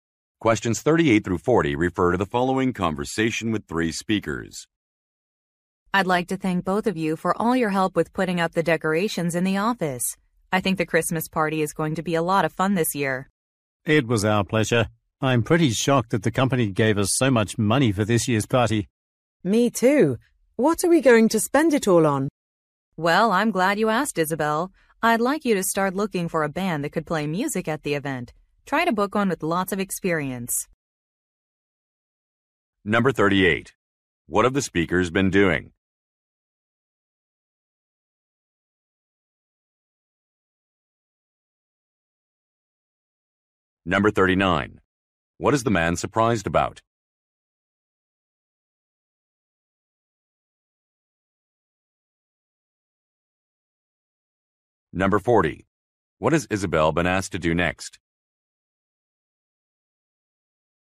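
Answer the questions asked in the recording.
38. Putting up decorations in the office
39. The company gave so much money for the party
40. Look for a band to play at the event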